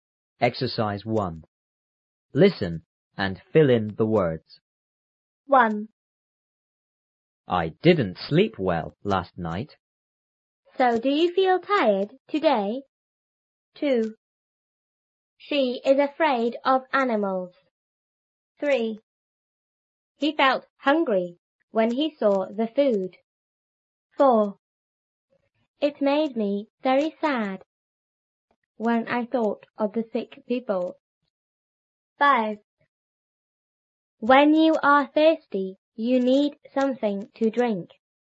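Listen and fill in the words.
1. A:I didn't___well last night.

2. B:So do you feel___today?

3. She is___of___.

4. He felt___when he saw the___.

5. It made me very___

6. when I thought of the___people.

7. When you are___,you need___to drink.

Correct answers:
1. sleep
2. tired
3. afraid; animals
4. hungry; food
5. sad
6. sick
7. thirsty; something

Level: 初中英语广州版3B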